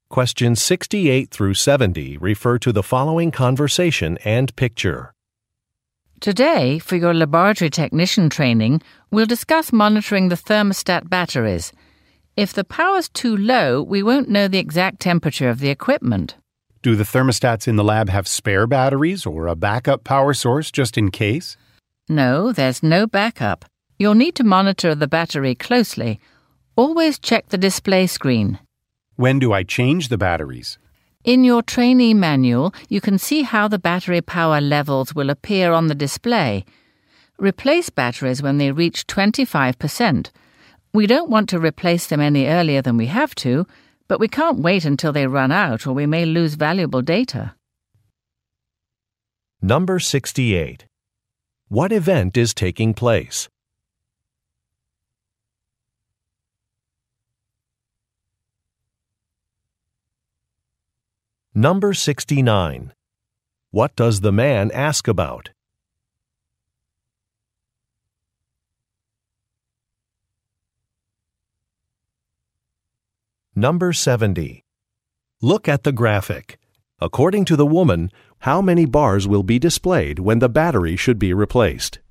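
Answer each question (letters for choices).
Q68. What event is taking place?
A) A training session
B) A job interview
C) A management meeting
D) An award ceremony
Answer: A

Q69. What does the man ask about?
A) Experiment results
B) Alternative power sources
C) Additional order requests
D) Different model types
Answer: B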